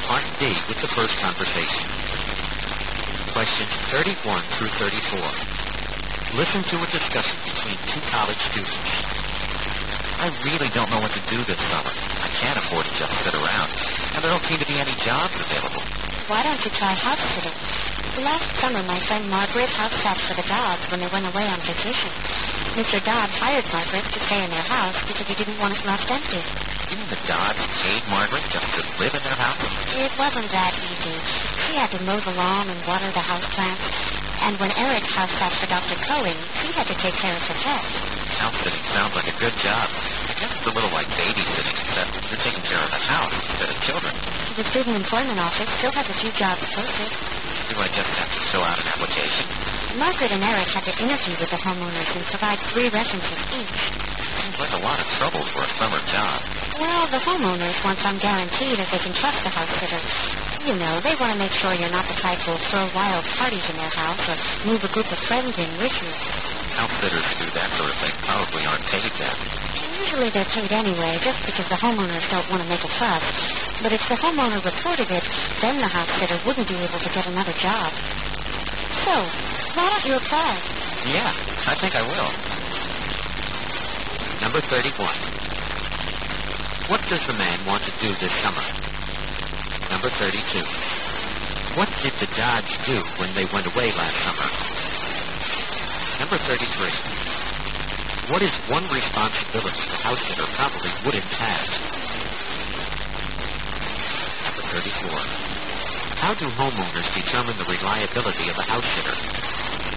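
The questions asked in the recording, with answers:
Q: What does the man want to do this summer?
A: Find a job

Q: What did the Dodge do when they went away last summer?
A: They hired Margaret to house-sit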